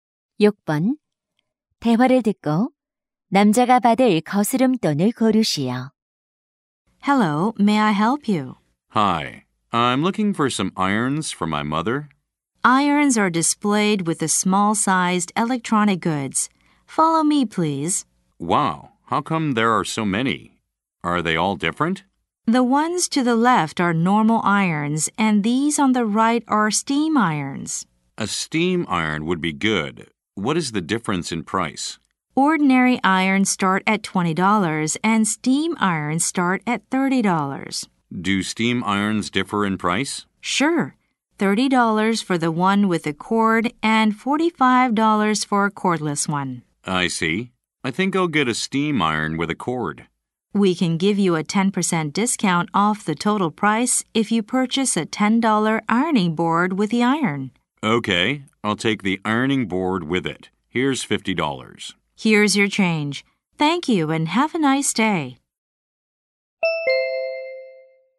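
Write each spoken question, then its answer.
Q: 대화를 듣고 남자가 받을 거스름돈을 고르시오.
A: 14달러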